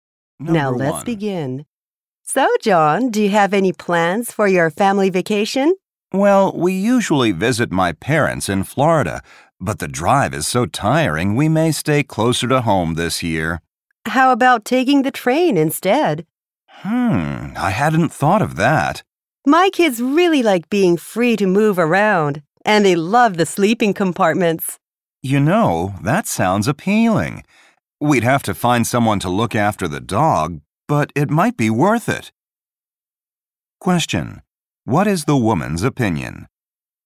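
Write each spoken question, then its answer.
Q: Question: What is the woman's opinion?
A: The family should take the train instead of driving.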